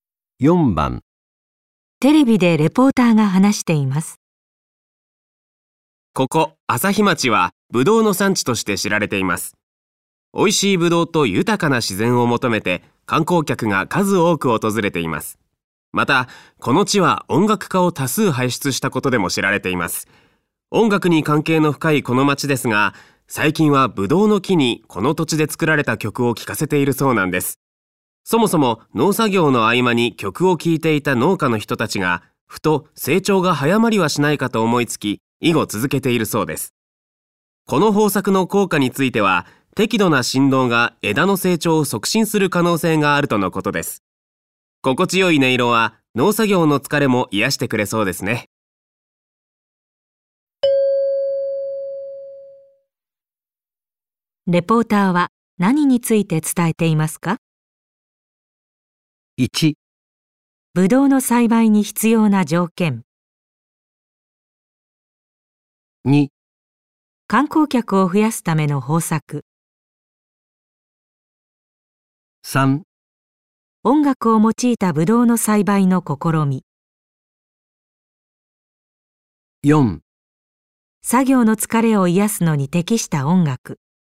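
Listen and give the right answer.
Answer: 3: 音楽を用いたブドウの栽培の試み。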